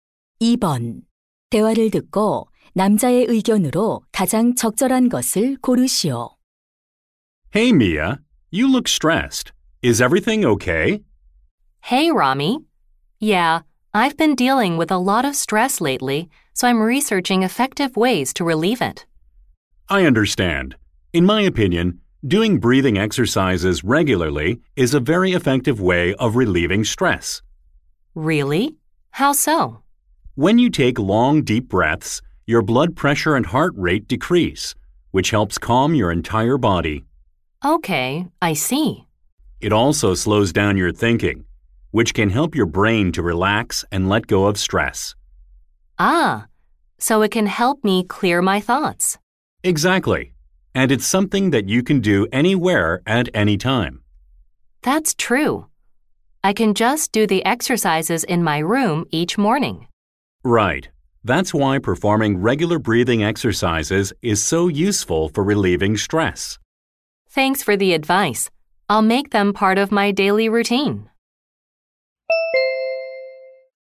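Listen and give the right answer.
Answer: 규칙적인 호흡 운동은 스트레스 해소에 효과적이다.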